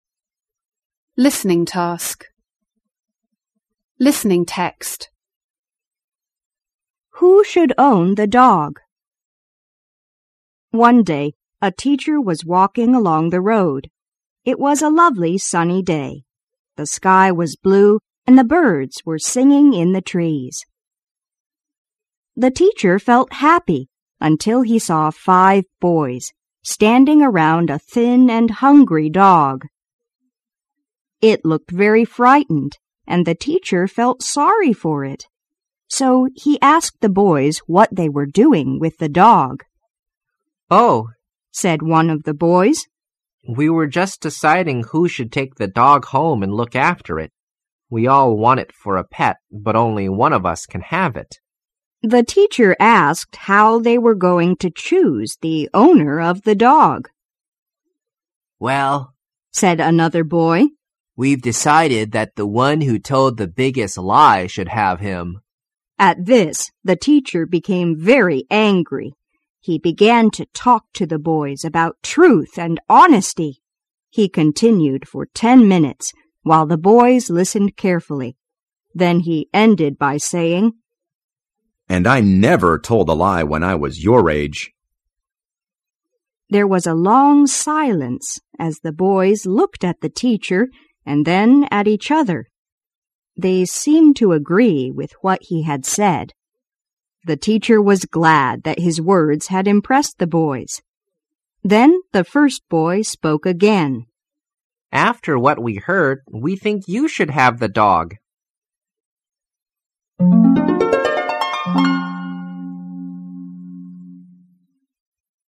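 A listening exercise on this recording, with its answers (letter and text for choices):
2.Listen to the tape again and choose the best answer to each question.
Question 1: Why did the children decide to give the dog to the teacher?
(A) Because none of them wanted to keep the dog.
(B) Because their teacher liked it.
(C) Because they could not decide which of them should own it.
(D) Because they thought the teacher had told the biggest lie.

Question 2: What do you know about the children?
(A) They all like dogs.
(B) They all respect their teachers.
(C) They all work hard at their lessons.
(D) They are honest and lovely.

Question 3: What do you know about the teacher?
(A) He does not like these boys.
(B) He wants to become the owner of the dog.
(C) He does not like the way the children choose an owner for the dog.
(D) He wants to stop the children telling lies to own the dog.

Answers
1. 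(D) Because they thought the teacher had told the biggest lie.
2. (A) They all like dogs.
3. (C) He does not like the way the children choose an owner for the dog.

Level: 高中英语必修四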